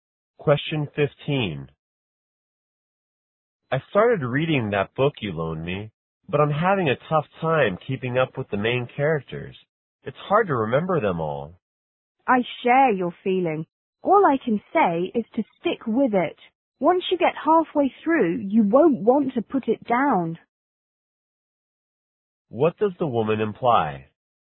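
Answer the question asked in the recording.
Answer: The book gets more interesting as you read on.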